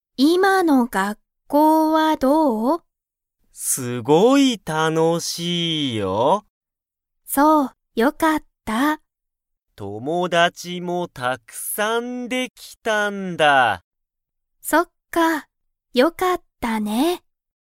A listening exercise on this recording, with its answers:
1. ヒロシは____がたくさんできた。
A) 学校(がっこう)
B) 先生(せんせい)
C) 友達(ともだち)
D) 仕事(しごと))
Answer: C) 友達(ともだち)

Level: Level 1

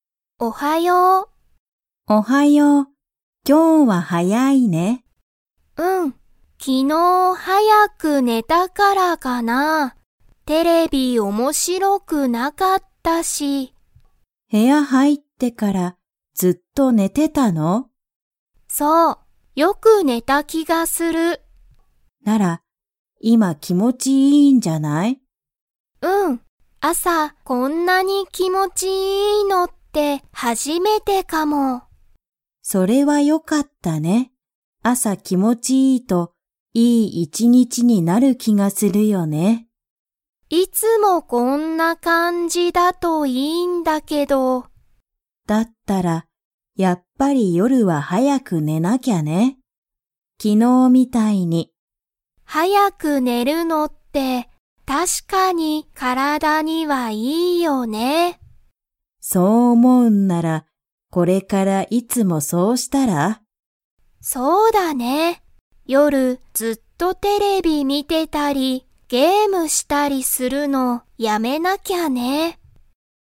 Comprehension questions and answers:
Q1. 昨日(きのう)、テレビは面白(おもしろ)かったですか?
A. はい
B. いいえ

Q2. アキが朝(あさ)、こんなに____のって初(はじ)めてだ。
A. 面白(おもしろ)い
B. すごい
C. 気持(きも)ちいい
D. 大(おお)きい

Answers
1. B. いいえ
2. C. 気持(きも)ちいい

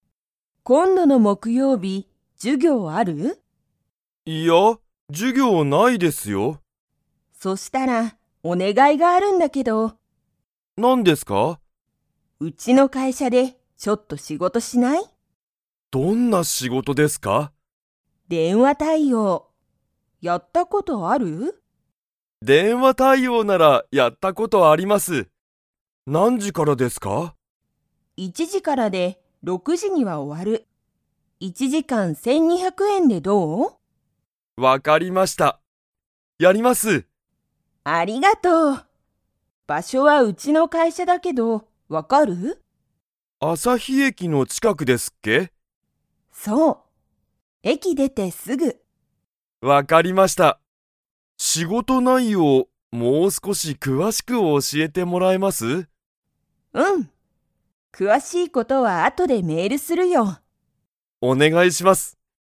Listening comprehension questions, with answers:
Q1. 今度こんどの木曜日もくようび、川野かわのさんは授業じゅぎょうが 。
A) ある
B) ない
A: B) ない

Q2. 電話でんわ対応たいおうの仕事しごとは、何時なんじに終おわりますか?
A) 1いち時じ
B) 2に時じ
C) 6ろく時じ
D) 12じゅうに時じ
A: C) 6ろく時じ

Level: Level 3

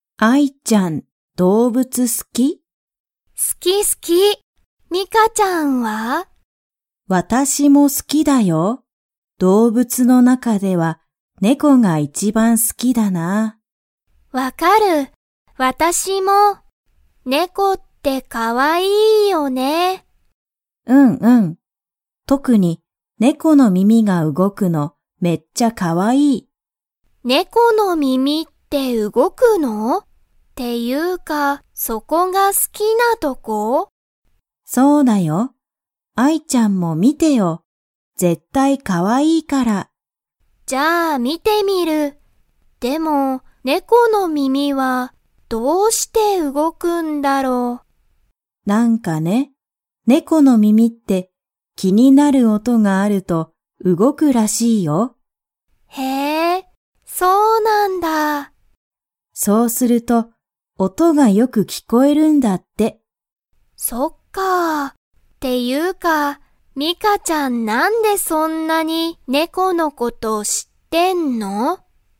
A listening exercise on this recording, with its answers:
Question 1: ミカは、猫ねこの が動うごくのが好すき。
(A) 顔かお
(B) 足あし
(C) 手て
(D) 耳みみ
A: (D) 耳みみ

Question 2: 猫ねこの耳みみが動うごくと、音おとがよく 。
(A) 聞きこえる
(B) 聞きこえない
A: (A) 聞きこえる

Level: Level 3

